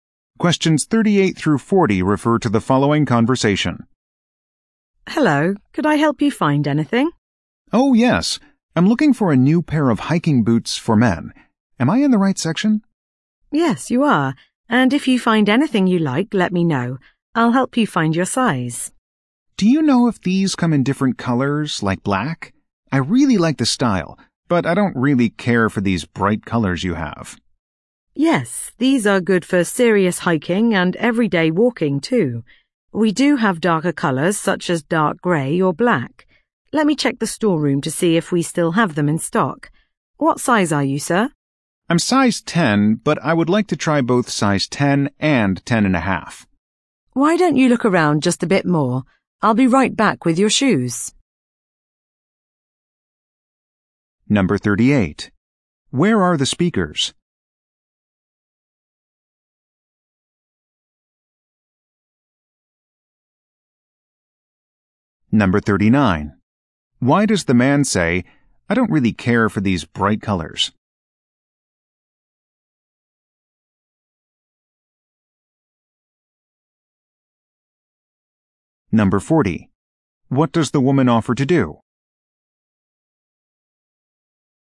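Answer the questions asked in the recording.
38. In a shoe store
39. He wants darker colors, like black
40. Check the storeroom for darker boots in his size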